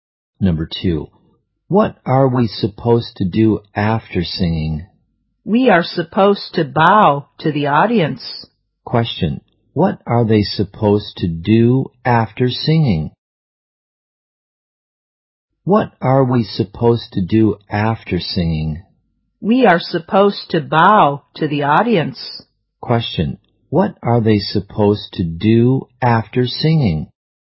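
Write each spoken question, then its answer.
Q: Question, what are they supposed to do after singing?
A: Bow to the audience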